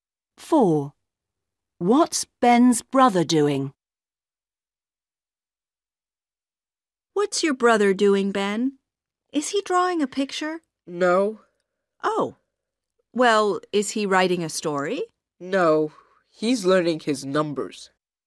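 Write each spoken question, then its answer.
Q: What's Ben's brother doing?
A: learning his numbers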